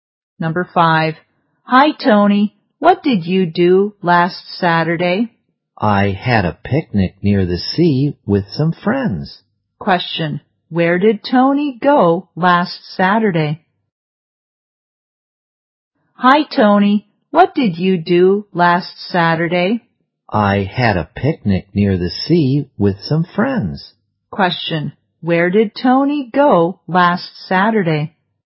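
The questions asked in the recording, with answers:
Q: where did Tony go last Saturday?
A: Near the sea, for a picnic.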